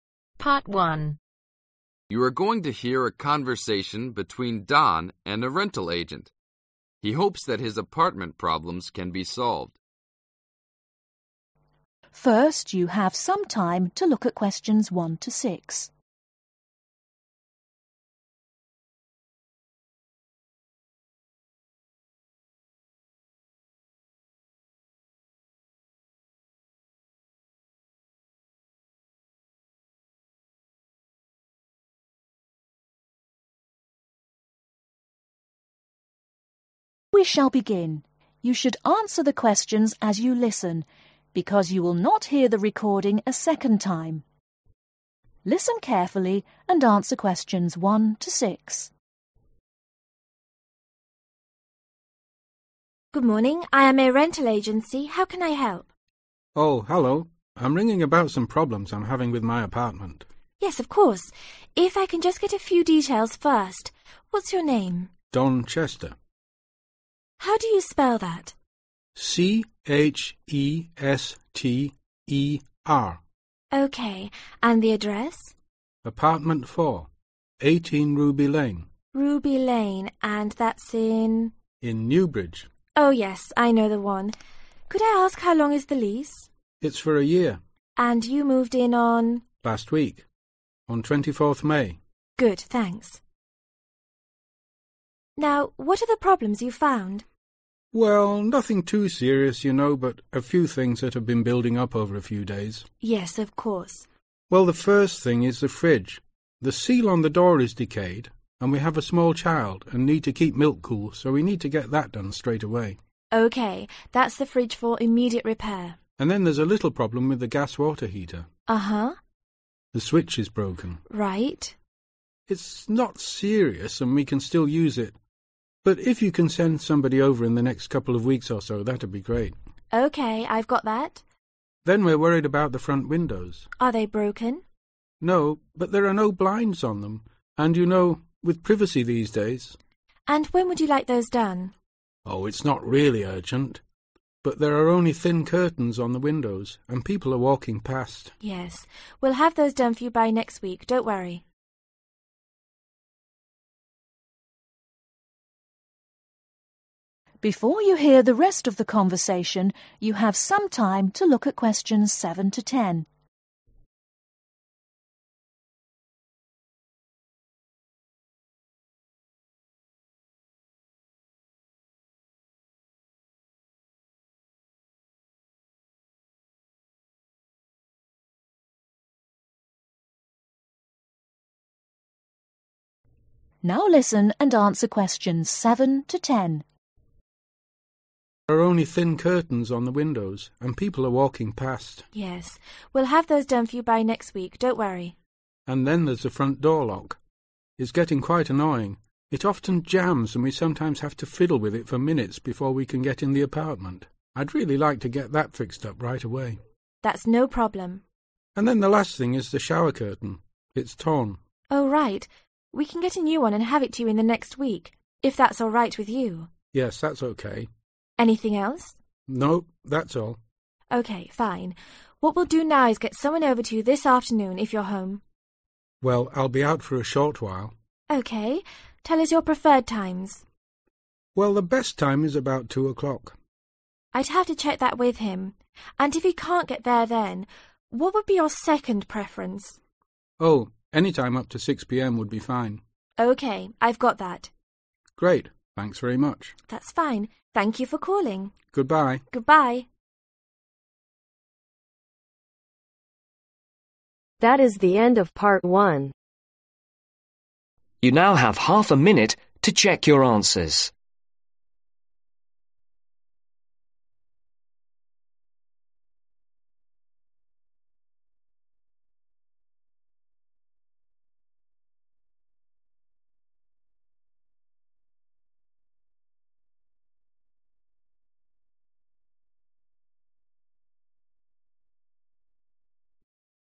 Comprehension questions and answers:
Complete the form below. Write NO MORE THAN TWO WORDS for each answer.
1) Name: Don (1)............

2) Address: Apartment 18 Ruby lane (2)............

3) Length of lease: (3)............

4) Date moved in: (4)............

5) Gas water heater switch is (5)............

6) Front windows (6)............ on them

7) front (7)............ jams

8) (8)............ curtain torn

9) Workman to call between (9)............ an after (10)............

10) Workman to call between (9)............ an after (10)............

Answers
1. Chester
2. New bridge
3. One year/a year
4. 24/24th May
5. Broken
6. No blinds
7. Door lock
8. Shower
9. 2 O'clock
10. 6 pm